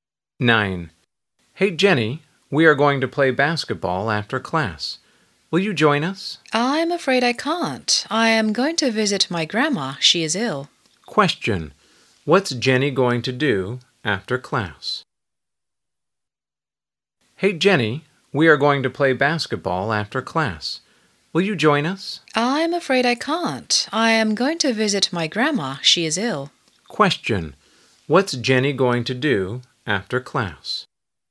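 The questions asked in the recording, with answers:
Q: Question. What's Jenny going to do after class?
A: Visit her grandma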